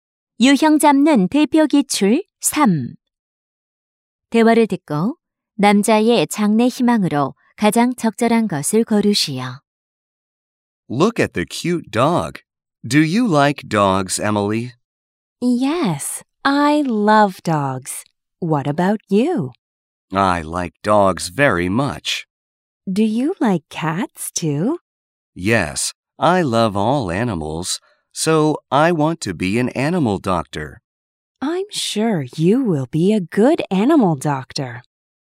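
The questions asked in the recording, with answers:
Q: 대화를 듣고 남자의 장래 희망으로 가장 적절한 것을 고르시오.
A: 수의사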